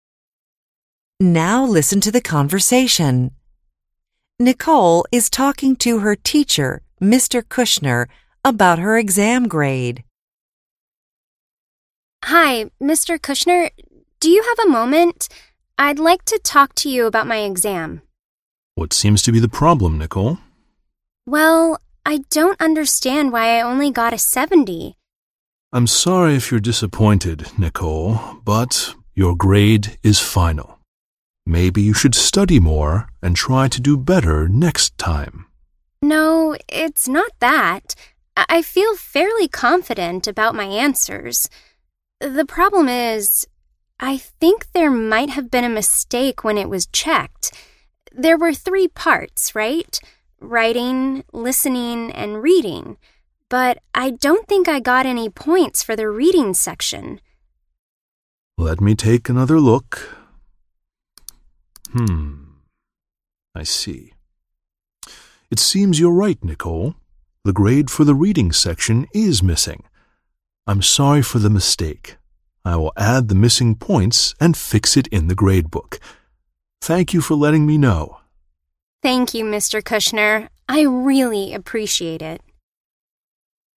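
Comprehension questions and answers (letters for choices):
In this section of the test, you will hear conversations and complete the information about them. For each conversation, first read the situation and the item or items. Then listen to the conversation. Complete the items after you hear the conversation. Choose the correct answer (a, b, c, or d).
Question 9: Mr. Kushner ____.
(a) thought that Nicole was disappointed with her grade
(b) doesn't think Nicole knows about his rules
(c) usually lets students take exams a second time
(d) thinks that Nicole will get a better grade next time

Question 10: Nicole thinks that she got a low grade because ____.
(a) she only had time to answer the reading questions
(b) she didn't get a grade on the reading section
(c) she forgot to answer the reading questions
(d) she did badly on the reading section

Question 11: In the end, Mr. Kushner ____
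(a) wasn't able to help Nicole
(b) asked Nicole not to miss an exam again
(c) apologized to Nicole for the problem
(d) realized that Nicole's exam was missing ____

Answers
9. a
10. b
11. c

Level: ADVANCED HYBRID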